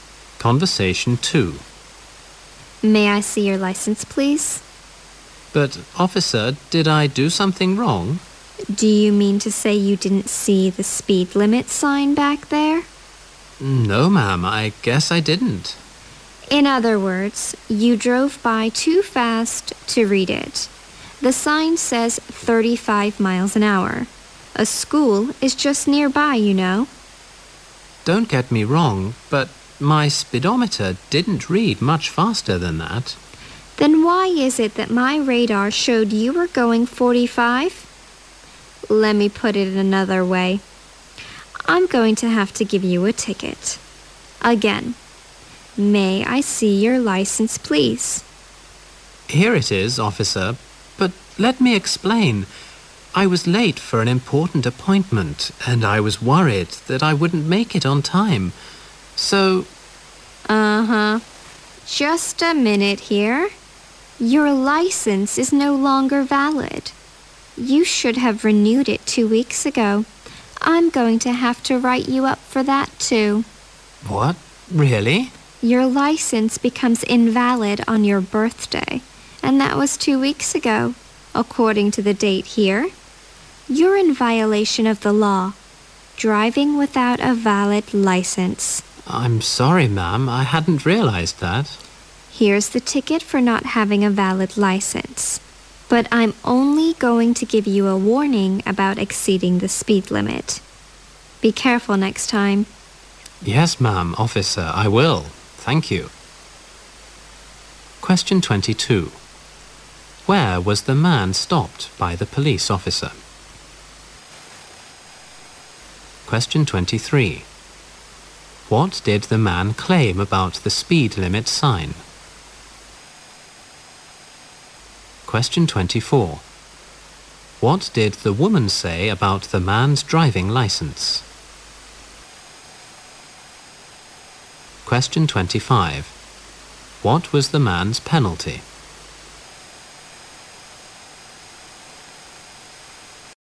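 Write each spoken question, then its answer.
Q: Where was the man stopped by the police officer?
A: Near a school

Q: What did the man claim about the speed limit sign?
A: He didn't see it

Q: What did the woman say about the man's driving license?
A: It was no longer valid; it should have been renewed 2 weeks ago

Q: What was the man's penalty?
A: A ticket for an invalid license and a warning for speeding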